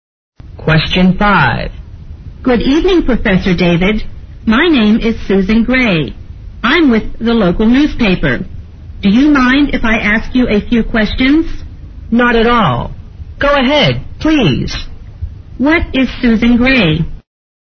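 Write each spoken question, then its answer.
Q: What is Susan Gray?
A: A newspaper reporter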